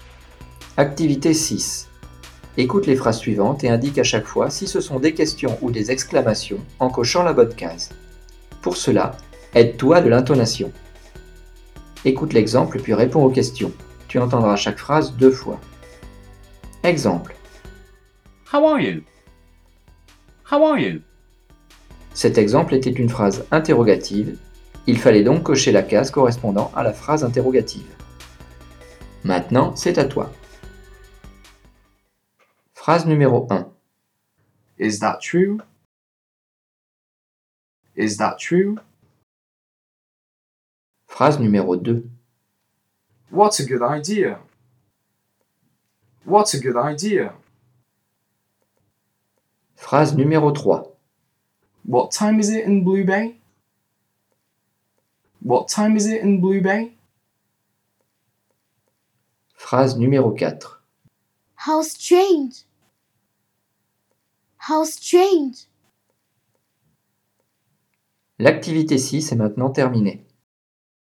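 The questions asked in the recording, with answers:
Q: Écoute les phrases suivantes et indique à chaque fois si ce sont des questions ou des exclamations en cochant la bonne case.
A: question (Is that true?)

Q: Écoute les phrases suivantes et indique à chaque fois si ce sont des questions ou des exclamations en cochant la bonne case.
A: exclamation (What a good idea)

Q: Écoute les phrases suivantes et indique à chaque fois si ce sont des questions ou des exclamations en cochant la bonne case.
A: question (What time is it in Blue Bay?)

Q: Écoute les phrases suivantes et indique à chaque fois si ce sont des questions ou des exclamations en cochant la bonne case.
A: exclamation (How strange)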